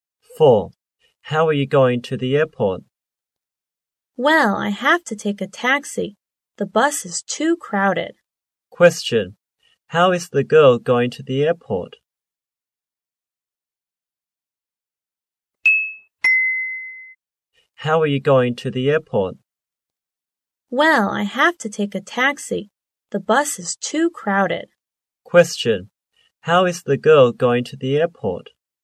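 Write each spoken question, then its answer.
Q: Question. How is the girl going to the airport?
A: By taxi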